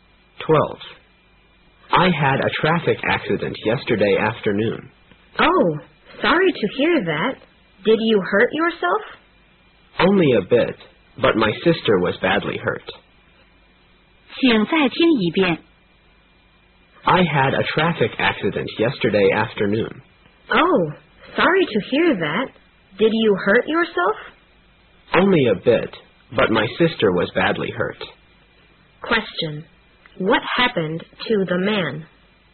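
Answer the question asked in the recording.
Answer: He had a traffic accident and was slightly hurt.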